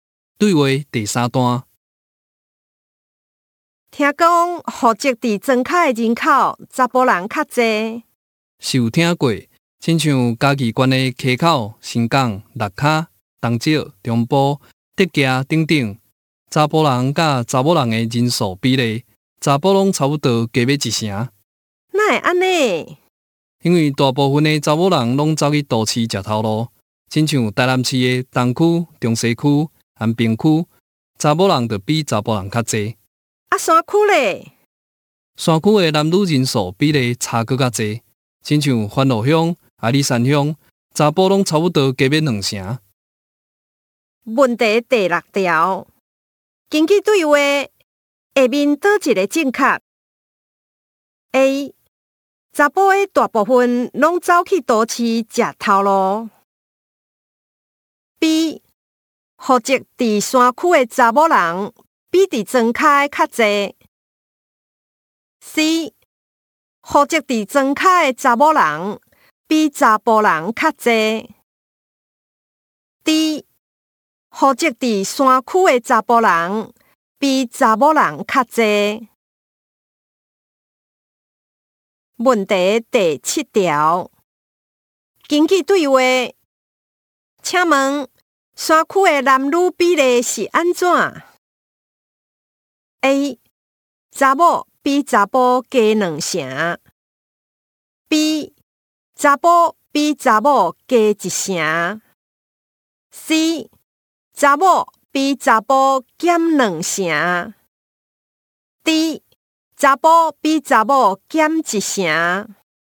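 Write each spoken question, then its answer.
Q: 根据对话,下面倒一个正确 ?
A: D: 户籍伫山区的查甫人比查某人较侪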